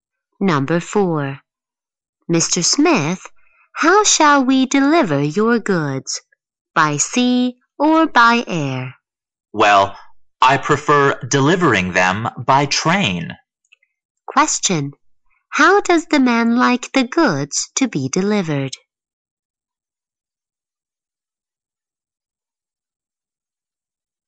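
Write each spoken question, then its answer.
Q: Question. How does the man like the goods to be delivered?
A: By train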